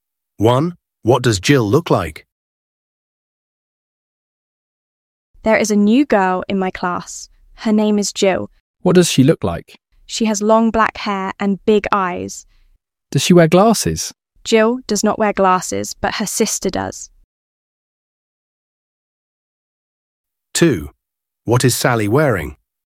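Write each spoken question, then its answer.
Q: What does Jill look like?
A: She has long black hair and big eyes and doesn't wear glasses.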